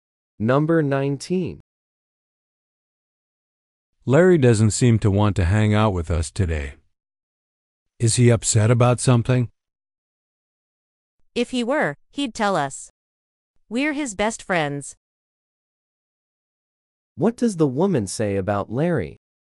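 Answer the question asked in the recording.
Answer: He is probably not upset, or he would tell them.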